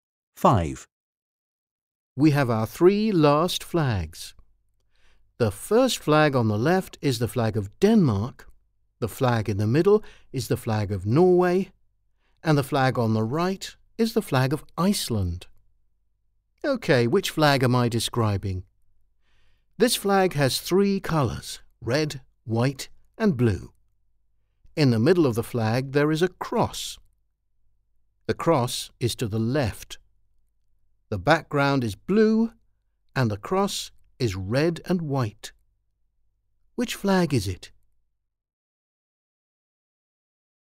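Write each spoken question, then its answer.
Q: Which flag is it?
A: C: the flag of Iceland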